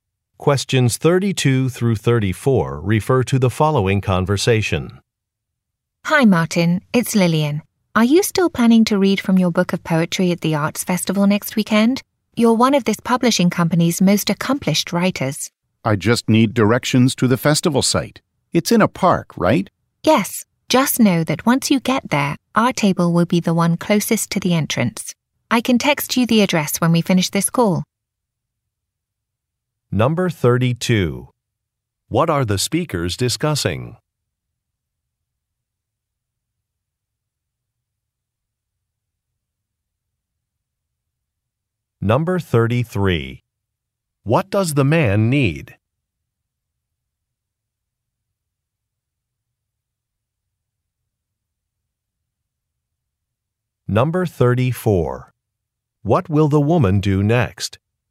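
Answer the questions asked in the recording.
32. The man's poetry reading at the Arts Festival
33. Directions to the festival site
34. Text him the address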